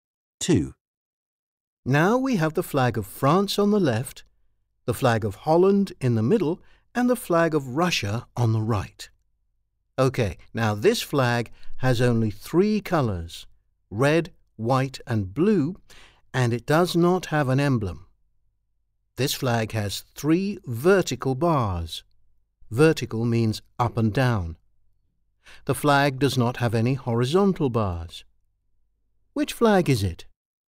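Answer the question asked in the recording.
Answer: A: the flag of France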